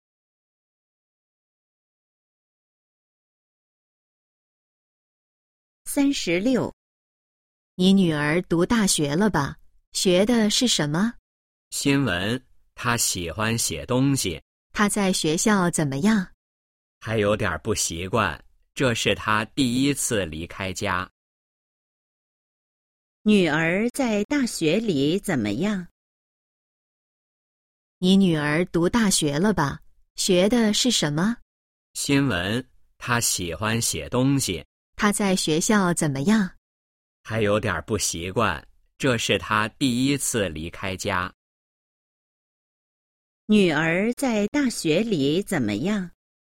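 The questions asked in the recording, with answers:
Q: 女儿在大学里怎么样?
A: 还有点不习惯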